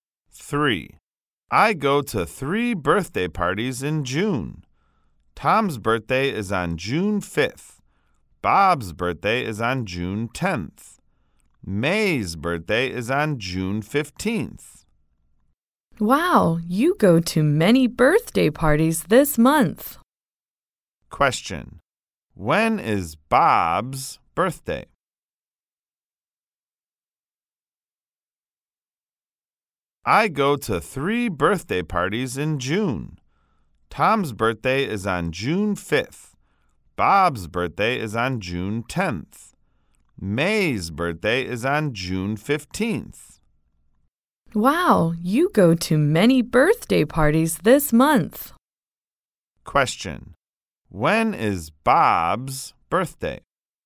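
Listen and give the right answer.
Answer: June 10th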